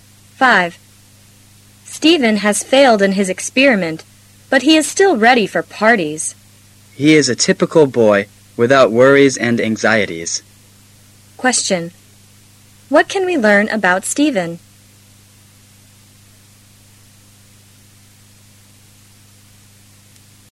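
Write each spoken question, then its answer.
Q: What can we learn about Stephen?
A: He is carefree and doesn't worry about failing his experiment.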